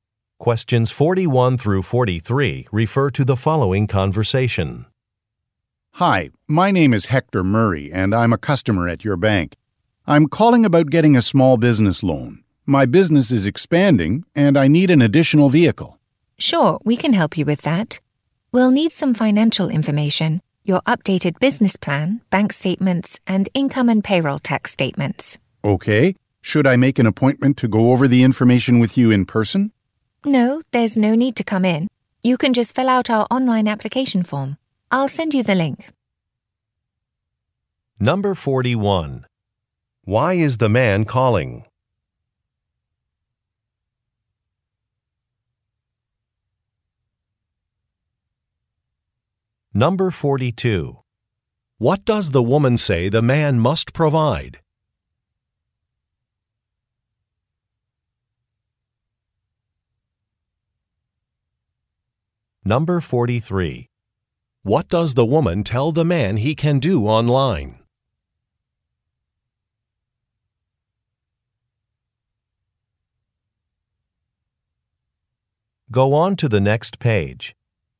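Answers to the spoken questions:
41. To get a small business loan
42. Financial information
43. Fill out an application form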